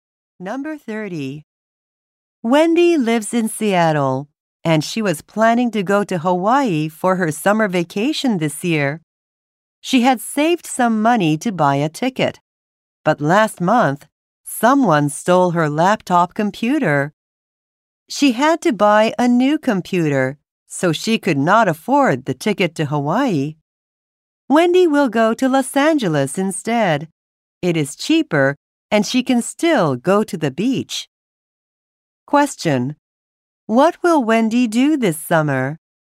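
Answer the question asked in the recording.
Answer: Go to Los Angeles.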